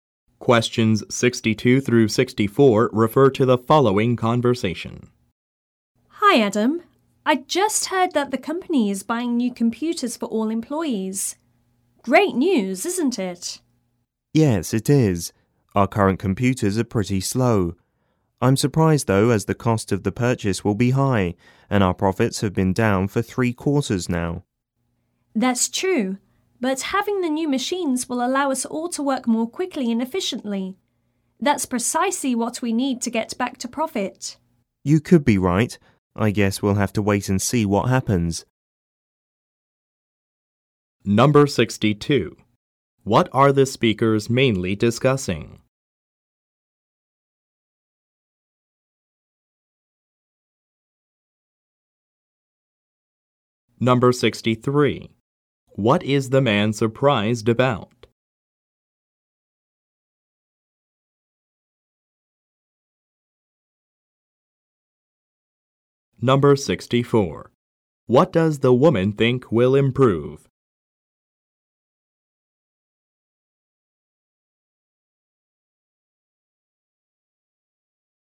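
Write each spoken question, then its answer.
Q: What are the speakers mainly discussing?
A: The company buying new computers for all employees

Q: What is the man surprised about?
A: That the company is making a costly purchase even though profits have been down for 3 quarters

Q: What does the woman think will improve?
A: Work speed and efficiency, helping the company get back to profit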